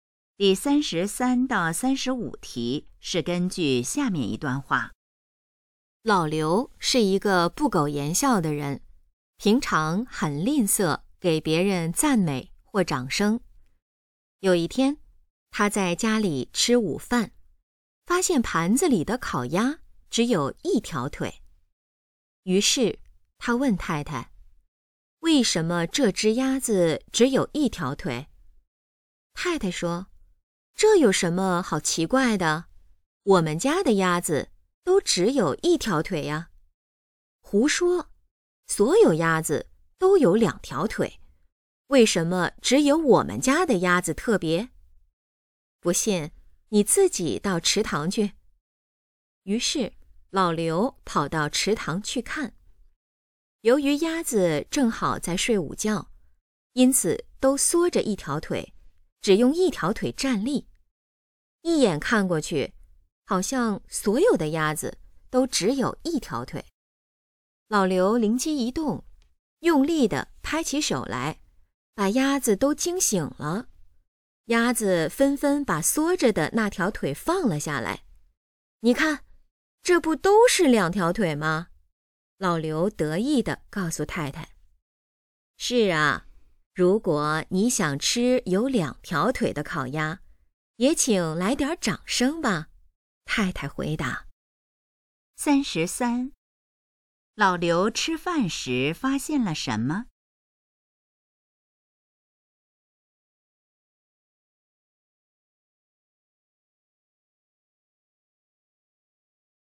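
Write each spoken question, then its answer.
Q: 老刘吃饭时发现了什么?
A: 盘子里的烤鸭只有一条腿

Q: 看到那些鸭子,老刘做了什么?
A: 用力地拍手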